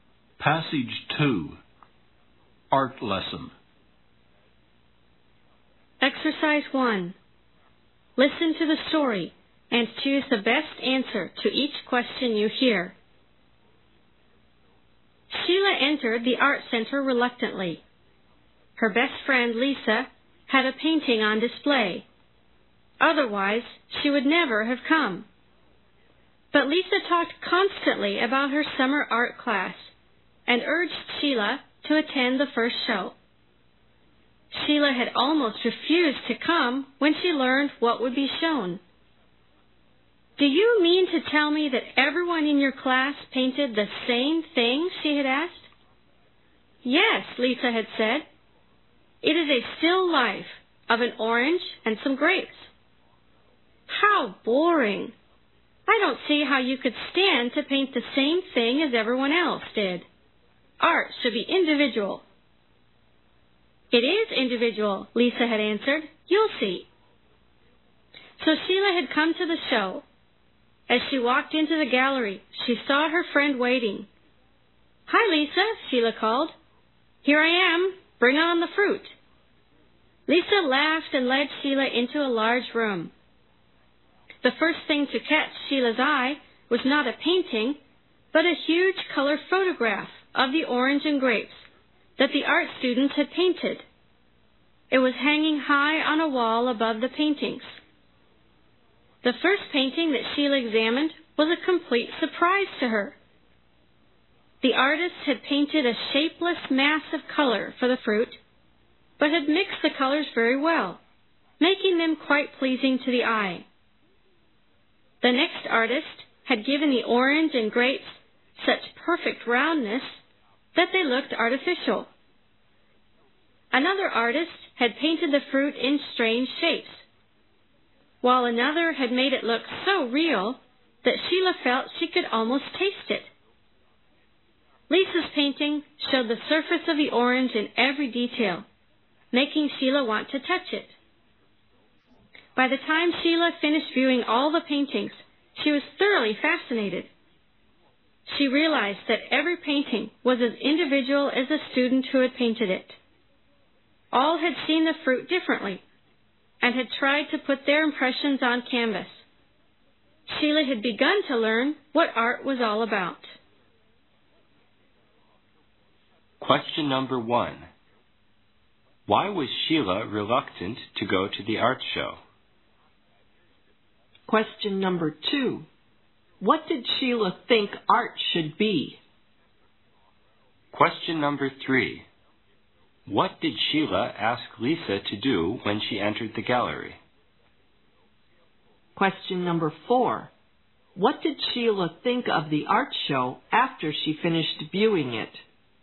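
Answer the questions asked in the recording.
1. Everyone in the class had painted the same thing, which she thought was boring.
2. Individual
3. Bring on the fruit
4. She was thoroughly fascinated; every painting was individual.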